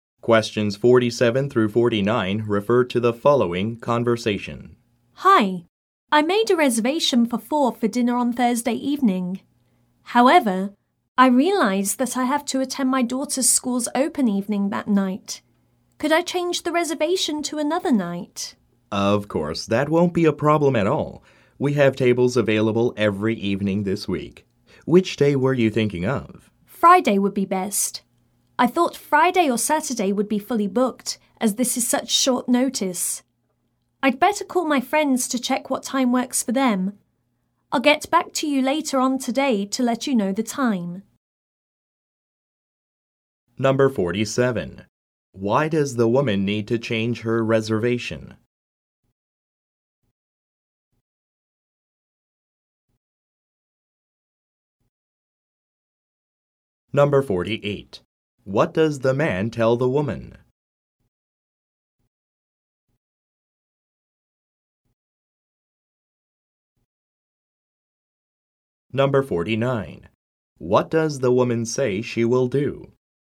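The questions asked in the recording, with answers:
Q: Why does the woman need to change her reservation?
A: She has to attend her daughter's school open evening.

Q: What does the woman say she will do?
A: Call her friends and get back to him later today with the time.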